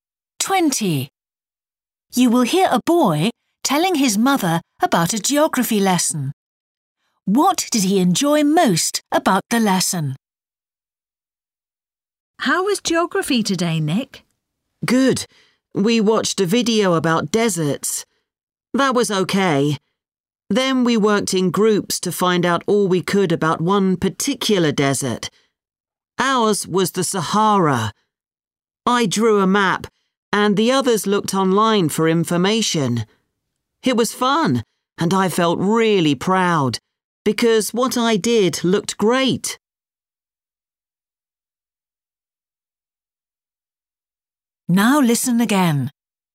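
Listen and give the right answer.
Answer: Drawing the map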